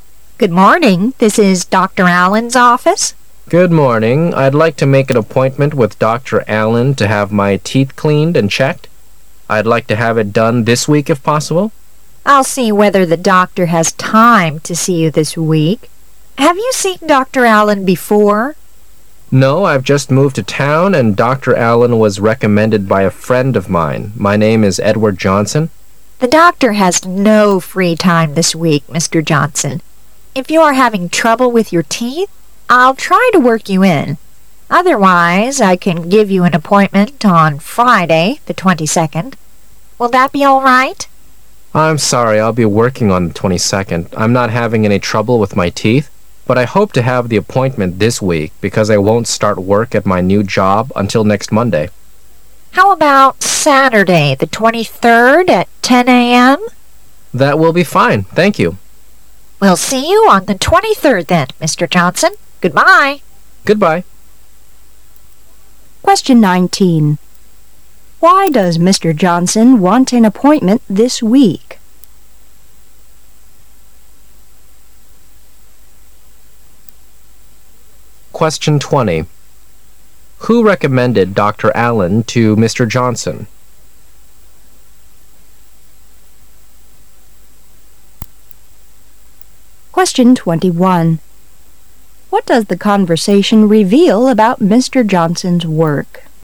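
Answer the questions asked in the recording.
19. Because he won't start his new job until next Monday
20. A friend of his
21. He will start a new job next Monday

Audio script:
[解析] 19-21 W: Good morning, this is Dr. Allen's office. M: Good morning, I'd like to make an appointment with Dr. Allen to have my teeth cleaned and checked. I'd like to have it done this week if possible. W: I'll see whether the doctor has time to see you this week. Have you seen Dr. Allen before? M: No, I've just moved to town and Dr. Allen was recommended by a friend of mine. My name is Edward Johnson. W: The doctor has no free time this week, Mr. Johnson. If you are having trouble with your teeth, I'll try to work you in, otherwise I can give you an appointment on Friday, the 22nd. Will that be all right? M: I'm sorry, I'1l be working on the 22nd. I'm not having any trouble with my teeth, but 1 hoped to have the appointment this week because I won't start work at my new job until next Monday. 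W: How about Saturday, the 23rd, at 10' AM? M: That will be fine. Thank you. W: We'll see you on the 23rd then, Mr. Johnson, Goodbye. Why does Mr. Johnson want an appointment this week?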